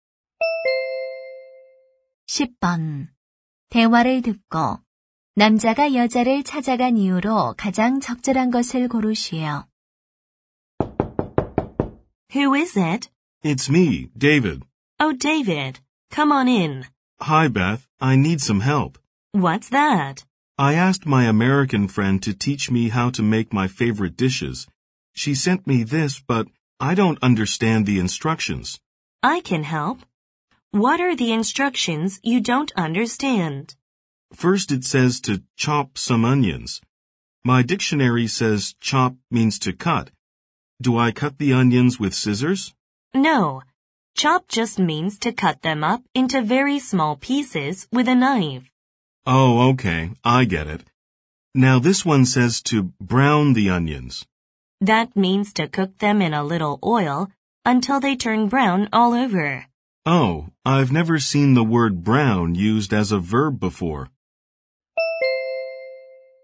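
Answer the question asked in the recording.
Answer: 요리법 설명을 이해하는 데 도움을 받으려고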